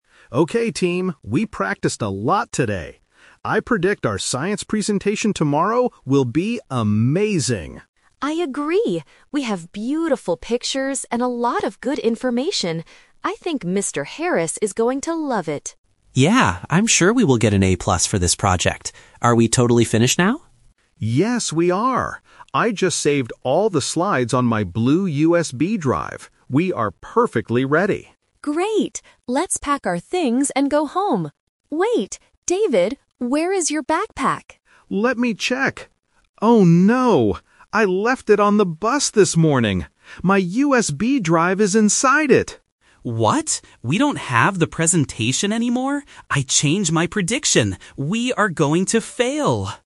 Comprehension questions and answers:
Listen to three students talking about their group project. Choose the correct answer (A, B, or C).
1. What does Tom predict about their grade at first?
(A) They will get an A+.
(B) They will get a bad grade.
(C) They will fail the project.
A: (A) They will get an A+.

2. Why does Sarah think the teacher will love the presentation?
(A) Because David is a very good speaker.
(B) Because they practiced for a long time.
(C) Because they have good information and pictures.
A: (C) Because they have good information and pictures.

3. What is the big problem at the end?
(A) They forgot to finish the slides.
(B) David lost his bag with their work inside.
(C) Tom deleted the file on the computer.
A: (B) David lost his bag with their work inside.

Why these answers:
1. Tom is very confident and says, "I'm sure we will get an A+ for this project." Trap: Option (C) is a trap because Tom says "we are going to fail" at the very end of the audio, but the question asks what he predicts at first. Option (B) is not mentioned.
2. Option (B) is a trap because David mentions they "practiced a lot", but Sarah specifically gives the pictures and information as the reason the teacher will love it. Option (A) is not mentioned.
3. David realizes his mistake and says, "I left it [my backpack] on the bus this morning! My USB drive is inside it!" Trap: Option (A) is a classic "Twist" trap. They actually did finish the slides (David says "Yes, we are!"), but they lost them. Option (C) is a plausible tech problem, but it is not what happened in the story.

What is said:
David (Leader): Okay team, we practiced a lot today. I predict our science presentation tomorrow will be amazing!
Sarah: I agree! We have beautiful pictures and a lot of good information. I think Mr. Harris is going to love it.
Tom: Yeah, I'm sure we will get an A+ for this project. Are we totally finished now?
David: Yes, we are! I just saved all the slides on my blue USB drive. We are perfectly ready.
Sarah: Great! Let's pack our things and go home. Wait... David, where is your backpack?
David: Let me check. Oh no... I left it on the bus this morning! My USB drive is inside it!
Tom: What?! We don't have the presentation anymore? I change my prediction... we are going to fail!

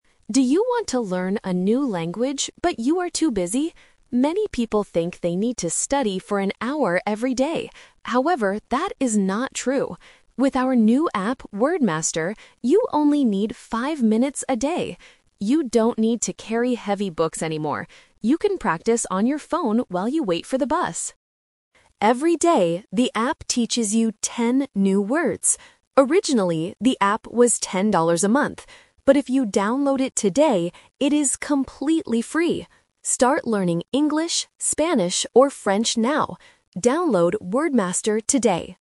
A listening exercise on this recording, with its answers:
Listen to the advertisement and circle the correct answer (A, B, or C).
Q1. How much time do you need to use the app every day?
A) One hour.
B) Five minutes.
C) Ten minutes.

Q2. What does the app teach you every day?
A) English grammar rules.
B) How to use a smartphone.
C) Ten new words.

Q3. How much does the app cost if you download it today?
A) Ten dollars a month.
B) It is completely free.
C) Five dollars a month.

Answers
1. B) Five minutes.
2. C) Ten new words.
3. B) It is completely free.

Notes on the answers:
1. The announcer explicitly says, "With our new app... you only need five minutes a day." Why the trap is wrong: Option (A) is the trap (The Twist). The speaker says many people think they need an hour, but says "that is not true!" Option (C) is a trap using the number "ten," which refers to the number of words, not the time.
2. The advertisement clearly states: "Every day, the app teaches you ten new words." Why the trap is wrong: Option (A) is a plausible guess for a language app, but grammar is not mentioned. Option (B) is a trap because the audio mentions practicing "on your phone," but the app doesn't teach you how to use the phone.
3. The announcer gives a special offer: "But if you download it today, it is completely free!" Why the trap is wrong: Option (A) is the trap. The app was "originally" ten dollars a month, but the price changed for today. Option (C) uses the number "five" (from five minutes) to confuse the listener.

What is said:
Announcer: Do you want to learn a new language, but you are too busy? Many people think they need to study for an hour every day. However, that is not true! With our new app, "WordMaster," you only need five minutes a day. You don't need to carry heavy books anymore. You can practice on your phone while you wait for the bus.
Every day, the app teaches you ten new words. Originally, the app was ten dollars a month. But if you download it today, it is completely free! Start learning English, Spanish, or French now. Download "WordMaster" today!

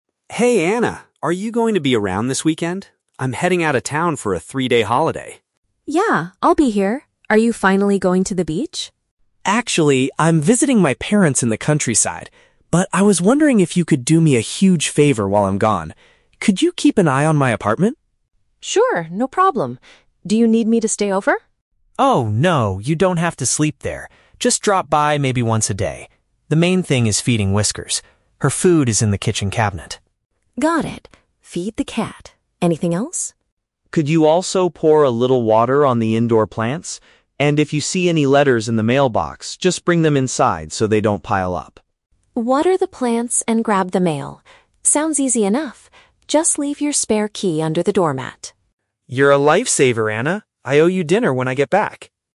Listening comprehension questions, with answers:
Listen to a conversation between two friends. Choose the correct answer (A, B, or C) for each question.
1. Why is the man leaving town for the weekend?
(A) To relax at the beach.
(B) To visit his relatives in a rural area.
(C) To attend a three-day business conference.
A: (B) To visit his relatives in a rural area.

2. What does Mark say his friend does NOT have to do?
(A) Spend the night at his apartment.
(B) Give some food to his pet cat.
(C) Bring his letters inside the house.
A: (A) Spend the night at his apartment.

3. Where will Anna find the object she needs to open the door?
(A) Inside a cabinet in the kitchen.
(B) Hidden beneath the mat by the entrance.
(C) Kept safely inside the mailbox.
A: (B) Hidden beneath the mat by the entrance.

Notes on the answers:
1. Mark says he is "visiting my parents in the countryside". Option B paraphrases this (relatives = parents; rural area = countryside). Option A is the Trap: Anna asks if he is going to the beach, but Mark replies "Actually, I'm visiting my parents...". Option C is not mentioned.
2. Anna asks "Do you need me to stay over?" and Mark replies "Oh, no, you don't have to sleep there." Option A paraphrases "sleep there" as "spend the night". Options B and C are Traps: Mark explicitly asks Anna to feed Whiskers (the cat) and bring the letters (mail) inside, so these are things she must do.
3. Anna tells Mark to leave his "spare key under the doormat" so she can enter the apartment. Option B paraphrases this perfectly (beneath the mat by the entrance = under the doormat). Option A is the Trap: The "kitchen cabinet" is where the cat food is kept, not the key. Option C is also a Trap: The "mailbox" is where she needs to collect the letters from, not where the key is hidden.

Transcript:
Mark: Hey Anna, are you going to be around this weekend? I'm heading out of town for a three-day holiday.
Anna: Yeah, I'll be here. Are you finally going to the beach?
Mark: Actually, I'm visiting my parents in the countryside. But I was wondering if you could do me a huge favor while I'm gone. Could you keep an eye on my apartment?
Anna: Sure, no problem. Do you need me to stay over?
Mark: Oh, no, you don't have to sleep there. Just drop by maybe once a day. The main thing is feeding Whiskers. Her food is in the kitchen cabinet.
Anna: Got it. Feed the cat. Anything else?
Mark: Could you also pour a little water on the indoor plants? And if you see any letters in the mailbox, just bring them inside so they don't pile up.
Anna: Water the plants and grab the mail. Sounds easy enough! Just leave your spare key under the doormat.

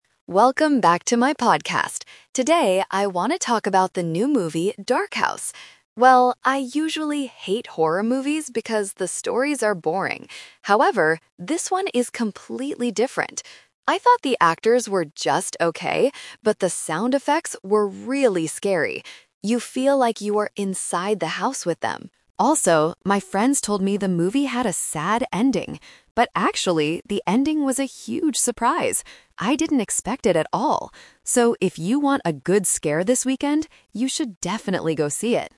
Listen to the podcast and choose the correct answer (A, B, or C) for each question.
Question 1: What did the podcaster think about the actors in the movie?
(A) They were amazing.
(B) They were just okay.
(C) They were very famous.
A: (B) They were just okay.

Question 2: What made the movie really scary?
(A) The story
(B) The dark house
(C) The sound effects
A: (C) The sound effects

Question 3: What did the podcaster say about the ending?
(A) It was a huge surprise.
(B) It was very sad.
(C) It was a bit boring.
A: (A) It was a huge surprise.

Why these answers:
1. The podcaster explicitly states, "I thought the actors were just okay". Option A is the trap because she thought other parts of the movie (like the ending) were amazing, but not the actors. Option C is not mentioned.
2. The podcaster says, "...but the sound effects were really scary." Option A is the trap because she mentions that horror movie stories are usually "boring". Option B is plausible because of the title Dark House, but it is not the reason she gives for the movie being scary.
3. The podcaster's friends told her the ending was "sad" (Option B is the trap). "But actually," she says, "the ending was a huge surprise!" Option C is the trap word used earlier to describe usual horror movie stories.

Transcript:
Podcaster: Welcome back to my podcast! Today, I want to talk about the new movie, Dark House. Well, I usually hate horror movies because the stories are boring. However, this one is completely different! I thought the actors were just okay, but the sound effects were really scary. You feel like you are inside the house with them. Also, my friends told me the movie had a sad ending. But actually, the ending was a huge surprise! I didn't expect it at all. So, if you want a good scare this weekend, you should definitely go see it.

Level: A2

